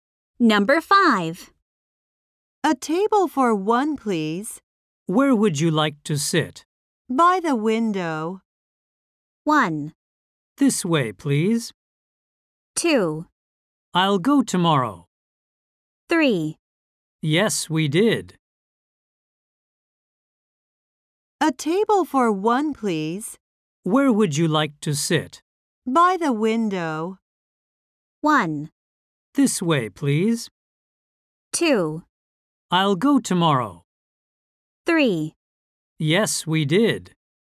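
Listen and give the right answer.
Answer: 1: This way, please.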